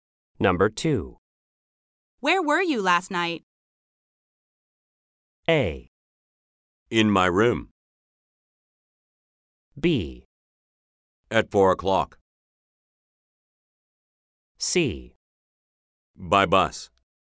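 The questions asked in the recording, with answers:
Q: Where were you last night?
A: A: In my room.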